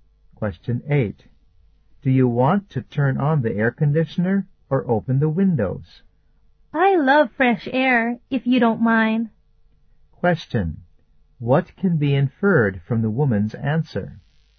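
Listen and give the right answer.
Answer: She would rather open the windows.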